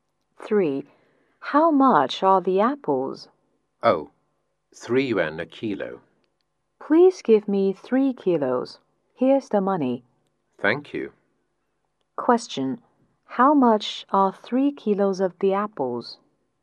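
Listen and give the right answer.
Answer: 9 yuan.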